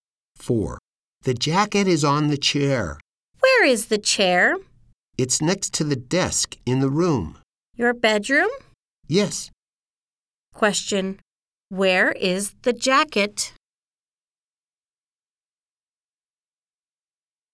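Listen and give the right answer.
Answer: On the chair.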